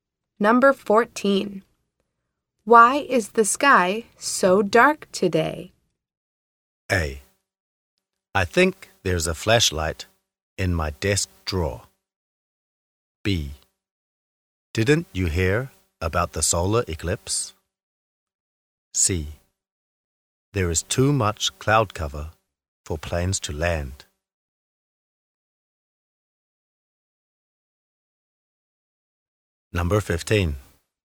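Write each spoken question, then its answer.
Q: Why is the sky so dark today?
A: B: Didn't you hear about the solar eclipse?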